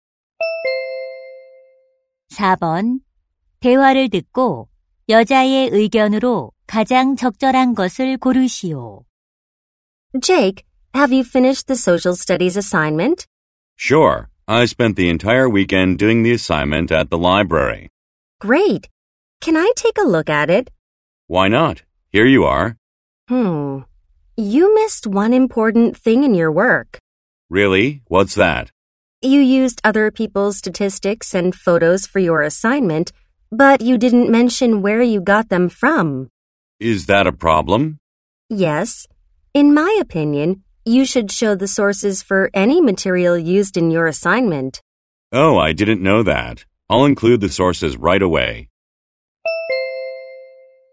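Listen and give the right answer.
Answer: 과제에 사용한 자료의 출처를 밝혀야 한다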